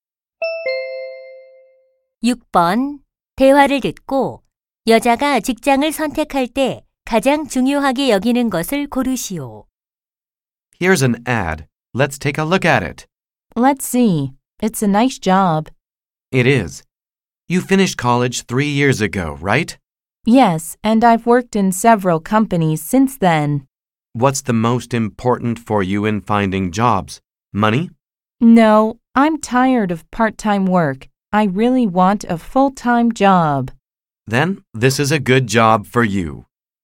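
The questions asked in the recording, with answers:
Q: 대화를 듣고 여자가 직장을 선택할 때 가장 중요하게 여기는 것을 고르시오.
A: 정규직(풀타임 일자리)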